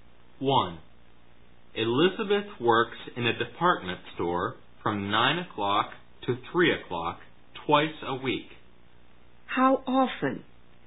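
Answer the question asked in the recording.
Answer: Twice a week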